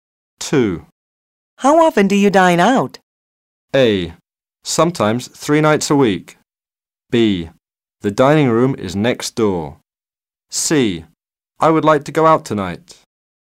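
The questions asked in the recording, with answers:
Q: How often do you dine out?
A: A: Sometimes 3 nights a week.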